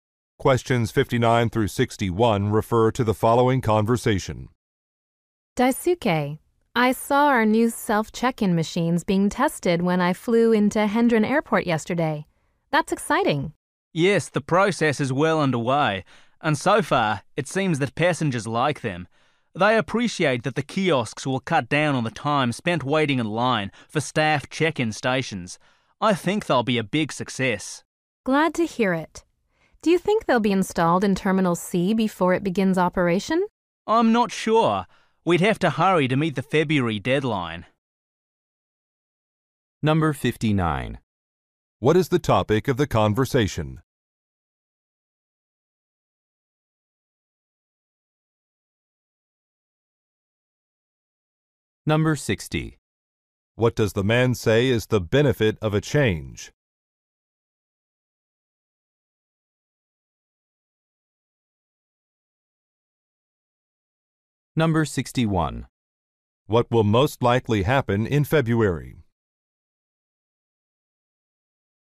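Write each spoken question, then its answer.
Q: What is the topic of the conversation?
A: New self-check-in machines at an airport

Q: What does the man say is the benefit of a change?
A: Less time waiting in line

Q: What will most likely happen in February?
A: Terminal C will begin operation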